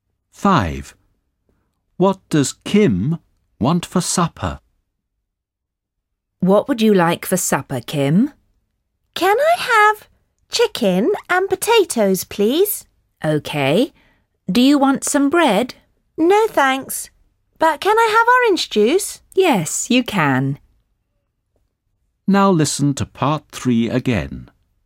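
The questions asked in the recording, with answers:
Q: What does Kim want for supper?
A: Chicken and potatoes, and orange juice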